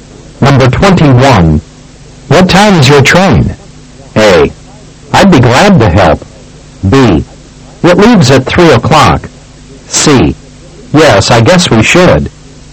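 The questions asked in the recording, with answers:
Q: What time is your train?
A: B: It leaves at 3 o'clock.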